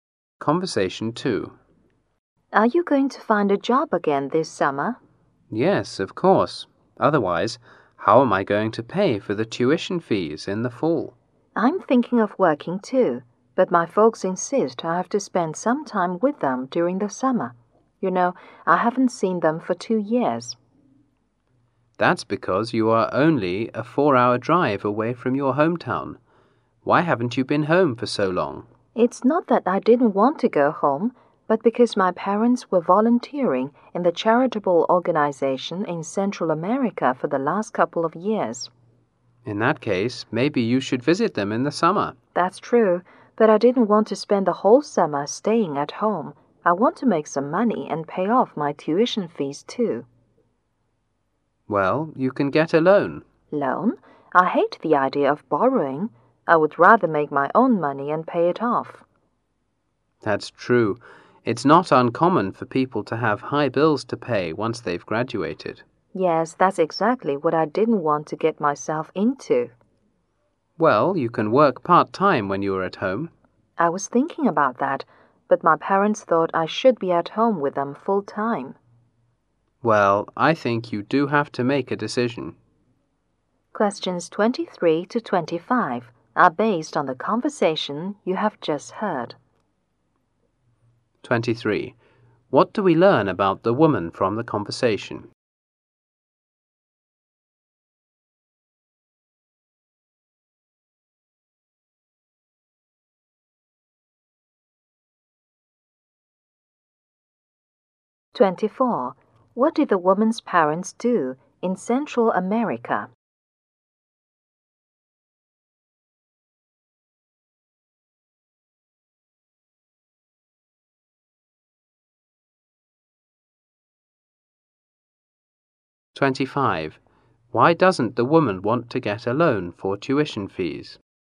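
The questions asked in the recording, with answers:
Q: What did the woman's parents do in Central America?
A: Volunteered in a charitable organization

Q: Why doesn't the woman want to get a loan for tuition fees?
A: She hates borrowing and doesn't want big bills after graduating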